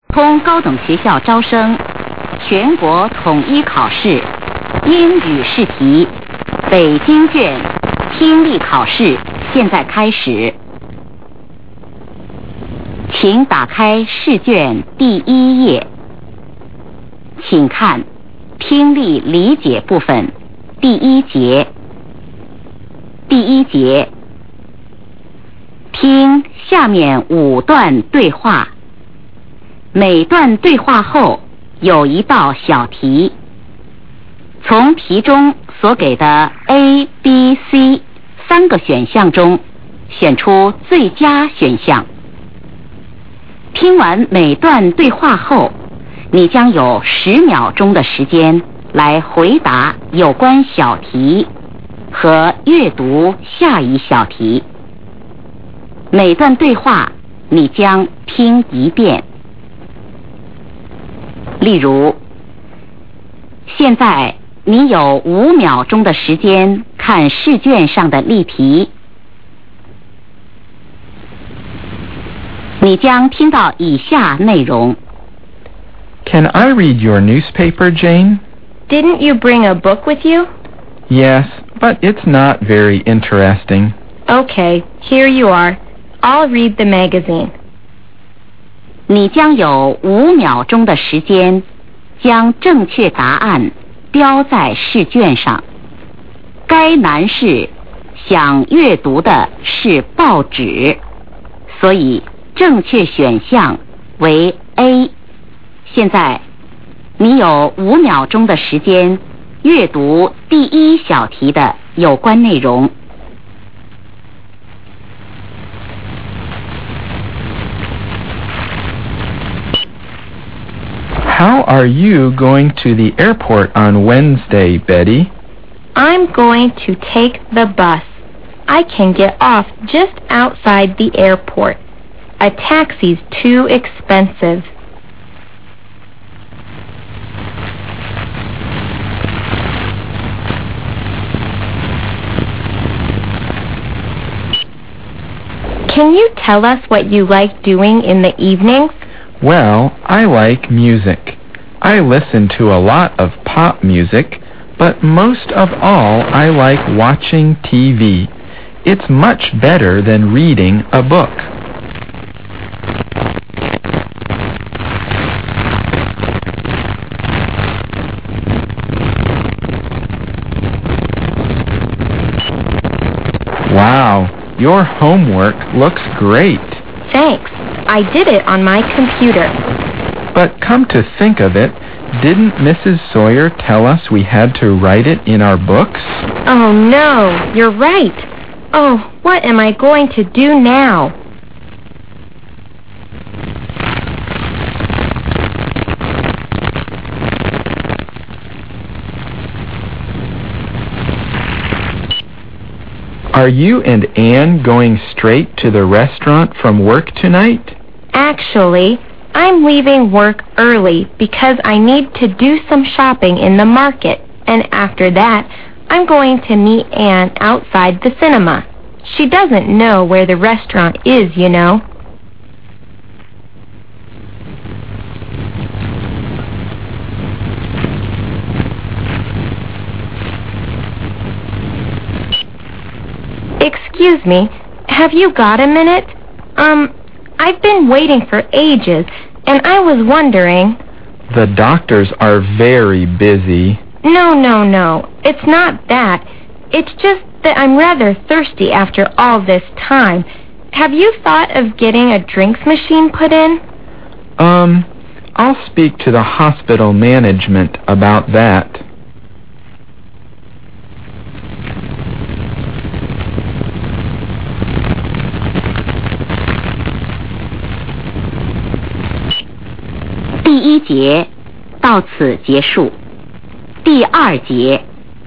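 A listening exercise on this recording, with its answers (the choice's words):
听下面5段对话。每段对话后有一道小题,从每题所给的A、B、C三个选项中选出最佳选项。听完每段对话后,你将有10秒钟的时间来回答有关小题和阅读下一小题。每段对话你将听一遍。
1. How is the woman going to the airport?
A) By taxi.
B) By train.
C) By bus.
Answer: By bus.

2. What is the man's favorite free-time activity?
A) Watching TV.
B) Reading a book.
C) Listening to music.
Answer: Watching TV.

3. What are they talking about?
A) Homework.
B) Computer.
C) Books.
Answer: Homework.

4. Where will the woman first go after work?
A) The cinema.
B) The market.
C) The restaurant.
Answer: The market.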